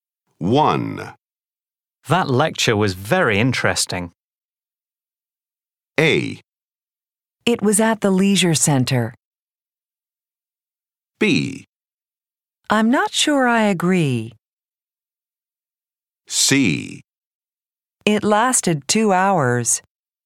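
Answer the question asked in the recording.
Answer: B: I'm not sure I agree.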